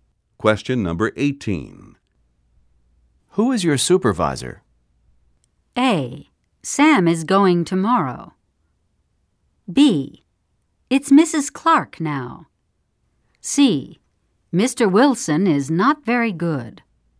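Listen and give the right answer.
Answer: B: It's Mrs. Clark now.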